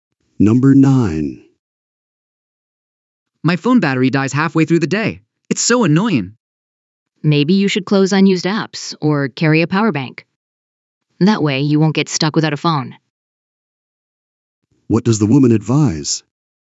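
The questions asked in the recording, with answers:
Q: What does the woman advise?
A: Close unused apps or carry a power bank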